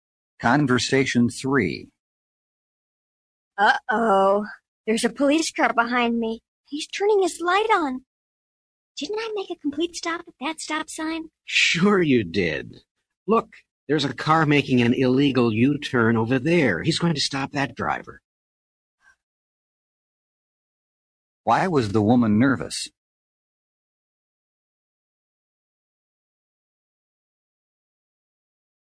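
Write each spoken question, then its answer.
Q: Why was the woman nervous?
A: She thought the police were stopping her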